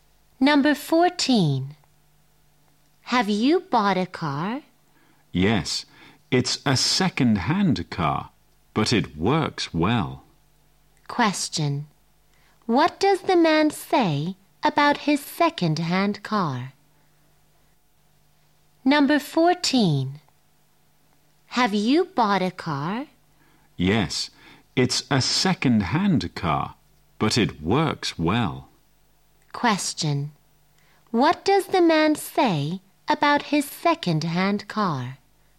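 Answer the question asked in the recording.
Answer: It works well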